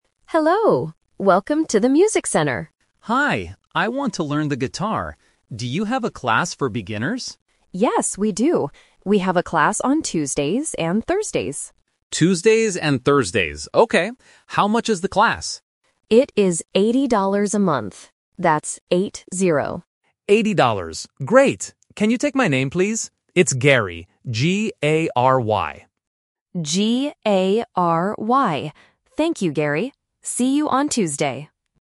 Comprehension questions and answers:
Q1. When is the guitar class?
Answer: On Tuesdays and Thursdays.

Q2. How much is the class per month?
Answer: $80

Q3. How do you spell the customer's name?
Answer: G-A-R-Y

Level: A1